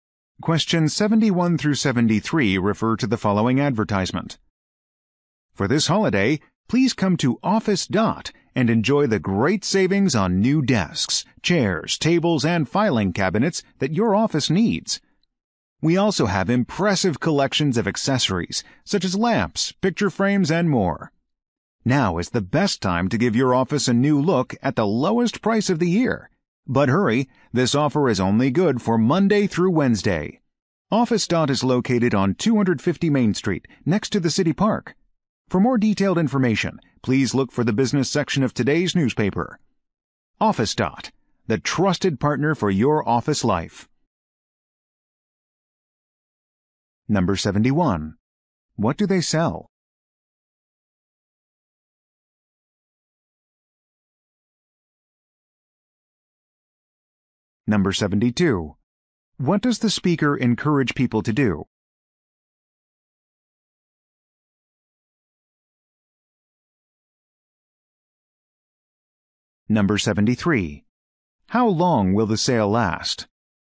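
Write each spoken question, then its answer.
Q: What do they sell?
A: Office furniture and accessories

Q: What does the speaker encourage people to do?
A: Come to Office Dot and save on a new office look

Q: How long will the sale last?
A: Three days, Monday through Wednesday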